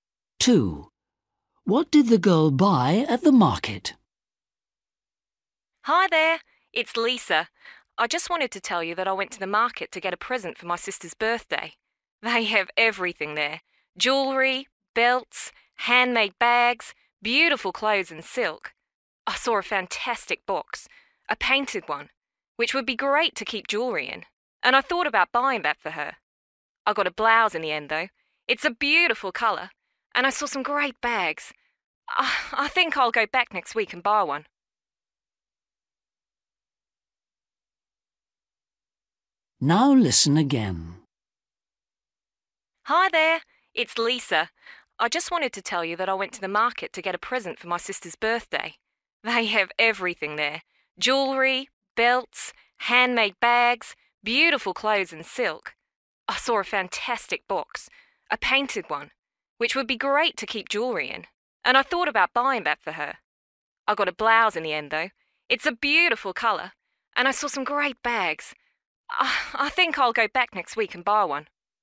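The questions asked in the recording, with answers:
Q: What did the girl buy at the market?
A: A blouse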